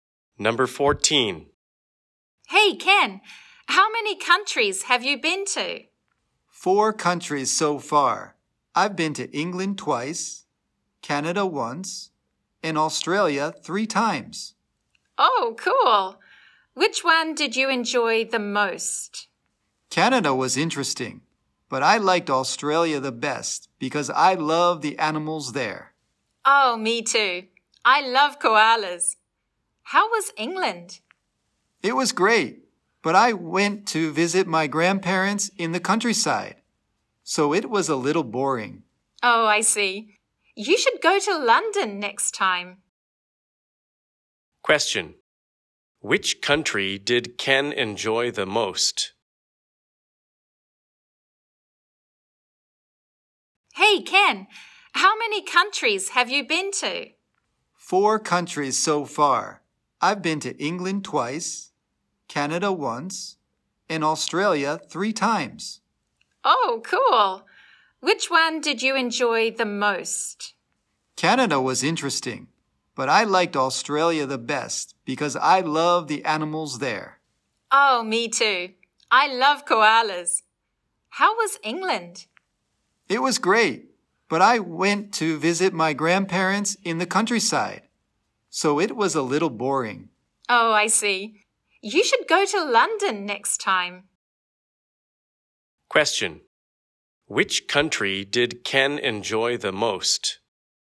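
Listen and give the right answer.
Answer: Australia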